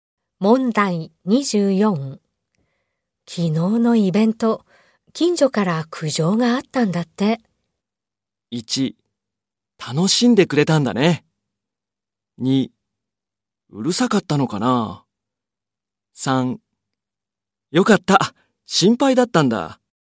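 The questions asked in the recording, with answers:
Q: 昨日のイベント、近所から苦情があったんだって。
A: 2: うるさかったのかな。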